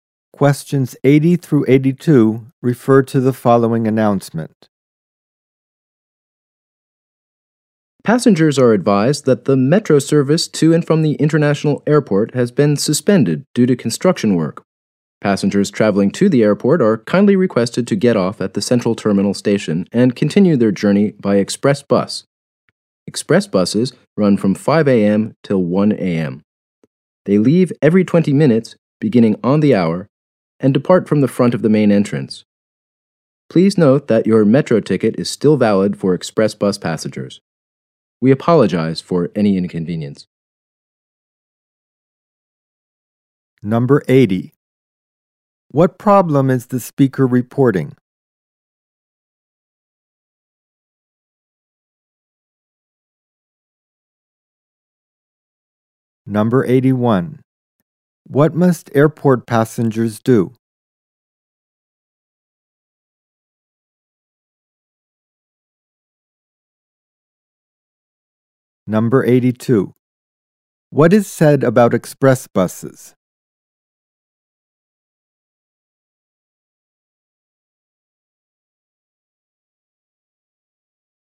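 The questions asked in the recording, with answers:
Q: What problem is the speaker reporting?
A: Metro service to the airport is suspended due to construction

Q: What must airport passengers do?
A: Get off at Central Terminal station and take the express bus

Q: What is said about express buses?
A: They leave every 20 minutes and metro tickets are valid on them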